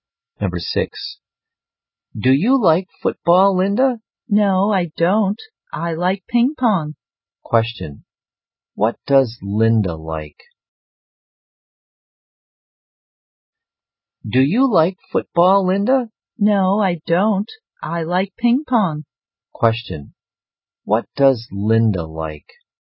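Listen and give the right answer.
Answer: Ping pong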